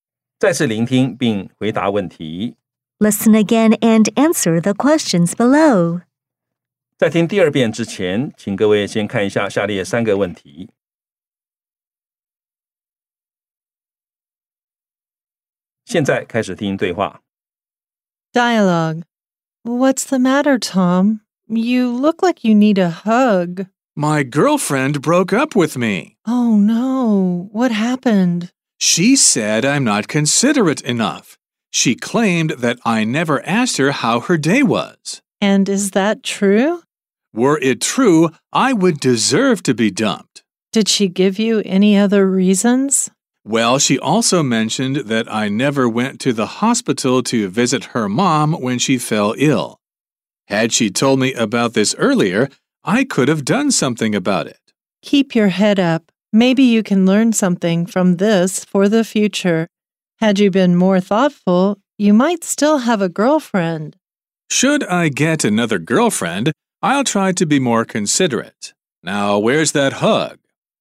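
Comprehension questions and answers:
再次聆聽並回答問題 Listen again and answer the questions below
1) What happened to the man?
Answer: His girlfriend broke up with him.

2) What did the man's girlfriend say about him?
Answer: She said he is not considerate enough and never asked her how her day was.

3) What will the man do if he gets another girlfriend?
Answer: He will try to be more considerate.

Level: 中階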